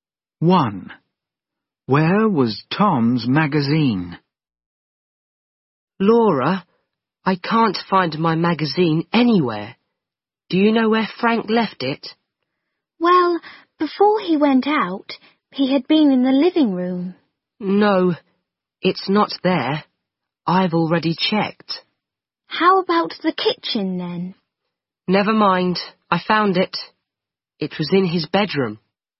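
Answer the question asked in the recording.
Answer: In his bedroom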